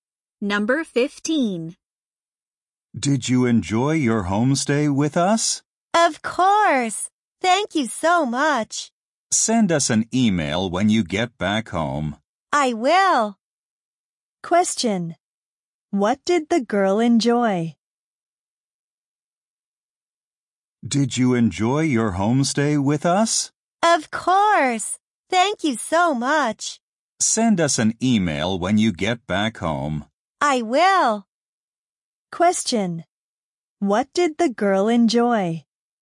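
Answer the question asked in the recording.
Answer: Her homestay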